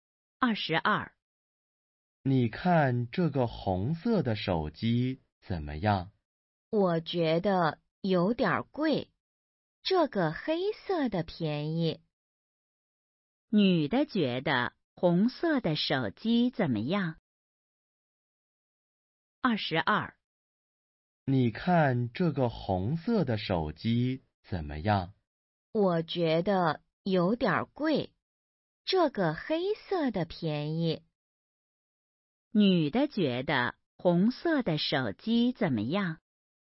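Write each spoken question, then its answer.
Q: 女的觉得红色的手机怎么样?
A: 有点贵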